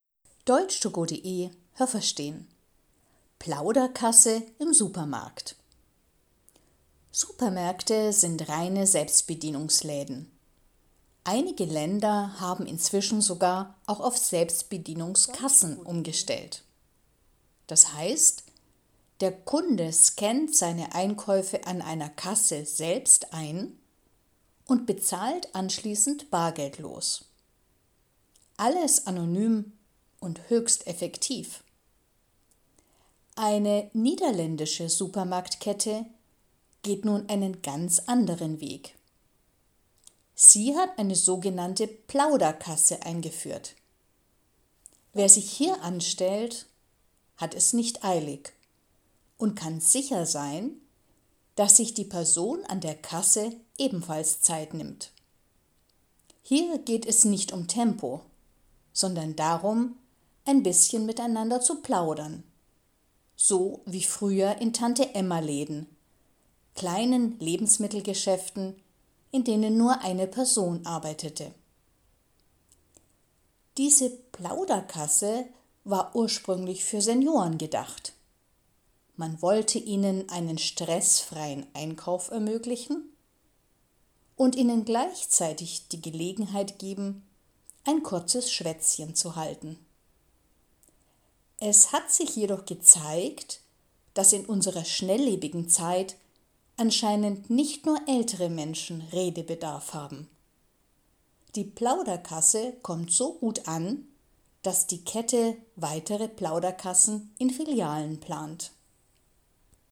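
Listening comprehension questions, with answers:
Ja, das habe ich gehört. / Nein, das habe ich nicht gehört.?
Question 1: In ein paar Ländern ist es möglich, seine Einkäufe im Supermarkt selber zu scannen. Haben Sie das gehört? Stimmt diese Aussage?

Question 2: Eine niederländische Supermarktkette hat eine Idee, wie man das Einkaufen noch effektiver gestalten kann. Haben Sie das gehört? Stimmt diese Aussage?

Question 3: Wer sich an der „Plauderkasse" anstellt, kann sich mit dem Bezahlen Zeit lassen. Haben Sie das gehört? Stimmt diese Aussage?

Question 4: Die Angestellten an der Kasse nehmen sich auch Zeit und zaubern für die Kunden. Haben Sie das gehört? Stimmt diese Aussage?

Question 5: In den früheren Tante-Emma-Läden wurden nur Dinge für Frauen verkauft. Haben Sie das gehört? Stimmt diese Aussage?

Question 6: Die Plauderkasse war für ältere Menschen gedacht, damit sie keinen Stress beim Einkaufen haben. 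Haben Sie das gehört? Stimmt diese Aussage?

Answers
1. Ja, das habe ich gehört.
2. Nein, das habe ich nicht gehört.
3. Ja, das habe ich gehört.
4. Nein, das habe ich nicht gehört.
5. Nein, das habe ich nicht gehört.
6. Ja, das habe ich gehört.

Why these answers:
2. Sie will das Einkaufen nicht effektiver machen, sondern menschlicher.
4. Sie zaubern nicht, aber sie haben Zeit zum Plaudern.
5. Das waren kleine Lebensmittelgeschäfte.

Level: B1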